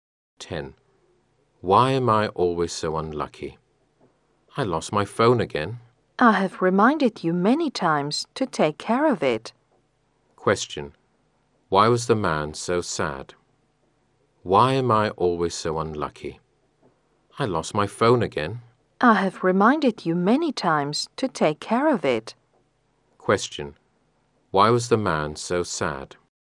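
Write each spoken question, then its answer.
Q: Why was the man so sad?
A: He lost his phone again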